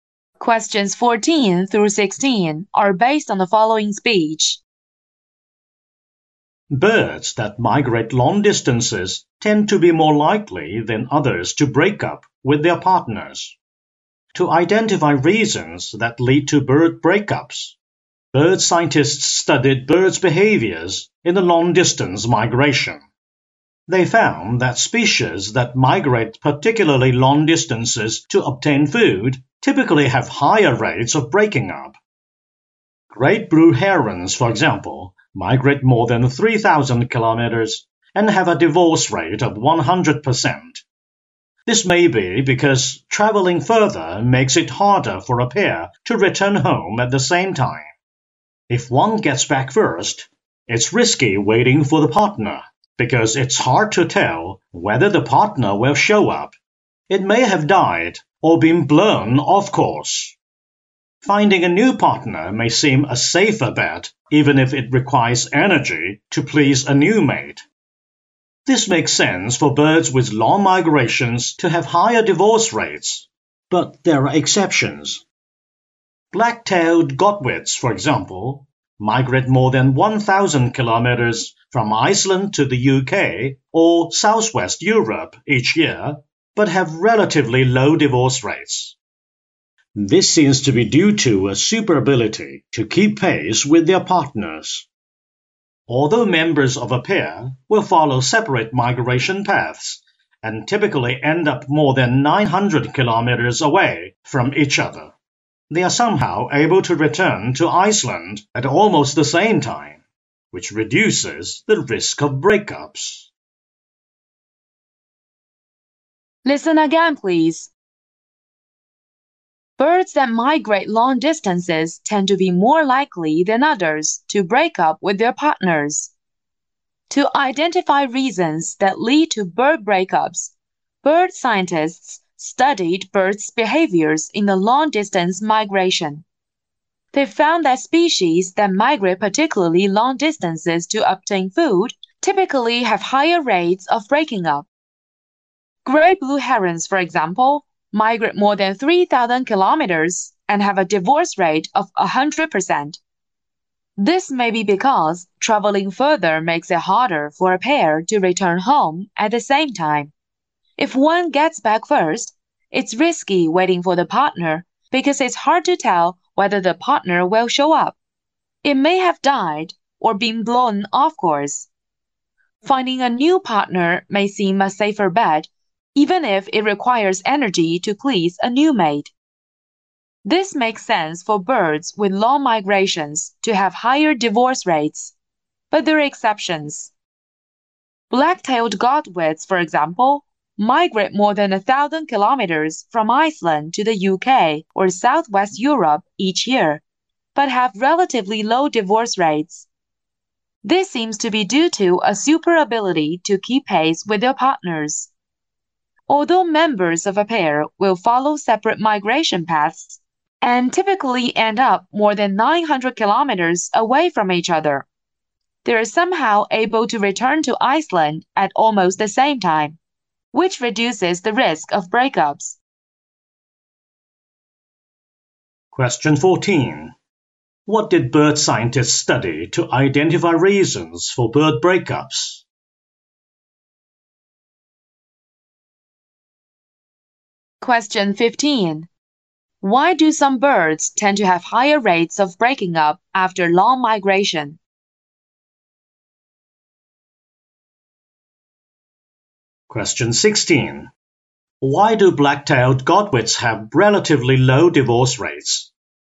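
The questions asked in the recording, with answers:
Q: What did bird scientists study to identify reasons for bird breakups?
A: Birds' behaviors during long-distance migration

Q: Why do some birds tend to have higher rates of breaking up after long migration?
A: It's harder for a pair to return home at the same time.

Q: Why do black-tailed godwits have relatively low divorce rates?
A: Partners return to Iceland at almost the same time.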